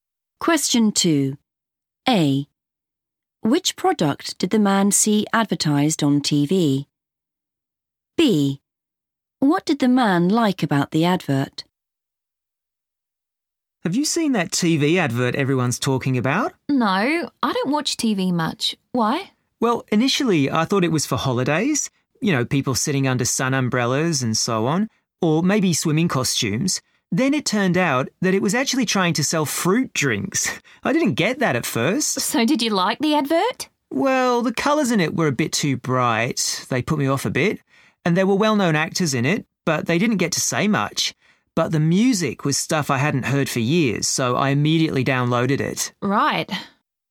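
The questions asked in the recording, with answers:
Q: Which product did the man see advertised on TV?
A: fruit drinks

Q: What did the man like about the advert?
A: the music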